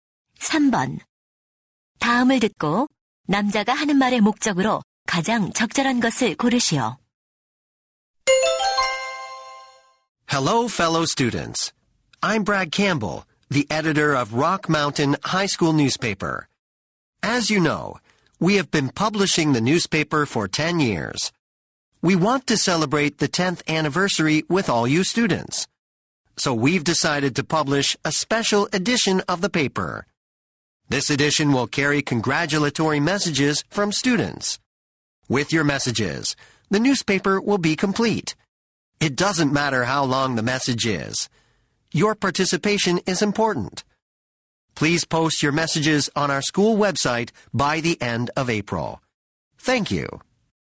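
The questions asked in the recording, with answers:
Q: 다음을 듣고 남자가 하는 말의 목적으로 가장 적절한 것을 고르시오.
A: 신문 창간 10주년 특별호에 실을 축하 메시지 참여를 요청하려고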